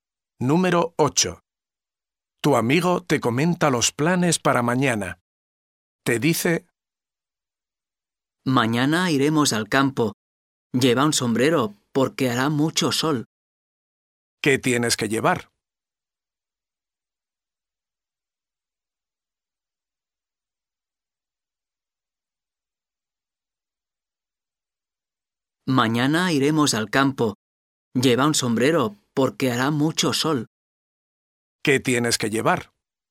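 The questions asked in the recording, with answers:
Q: ¿Qué tienes que llevar?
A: Un sombrero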